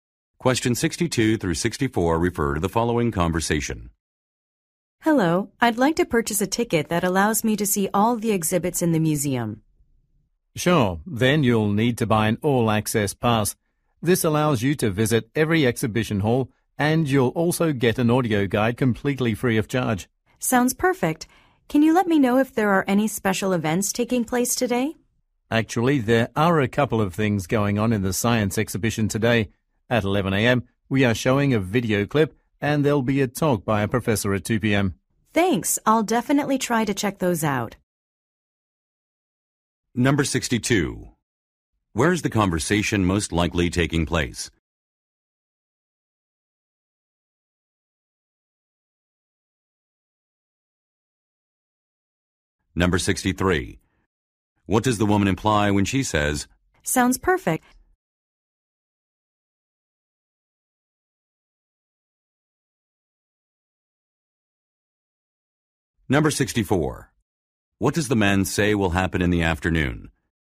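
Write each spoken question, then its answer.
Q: Where is the conversation most likely taking place?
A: At a museum

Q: What does the woman imply when she says,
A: She will buy the all-access pass

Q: What does the man say will happen in the afternoon?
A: A professor will give a talk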